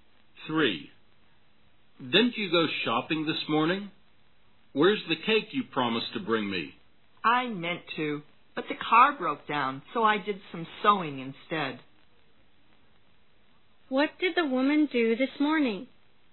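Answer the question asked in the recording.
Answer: She did some sewing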